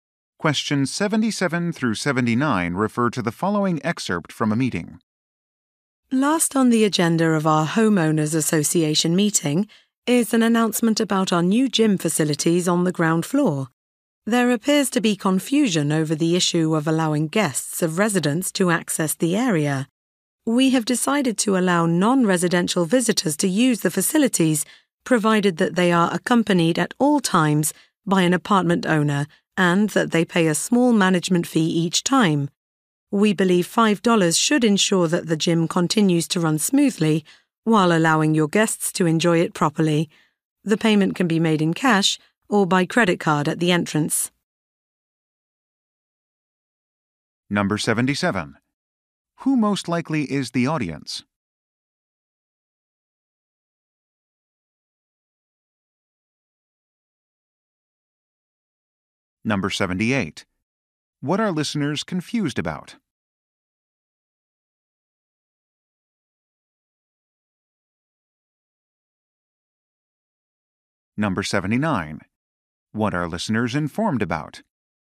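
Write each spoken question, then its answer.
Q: Who most likely is the audience?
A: Apartment residents (homeowners)

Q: What are listeners confused about?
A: Whether guests can use the gym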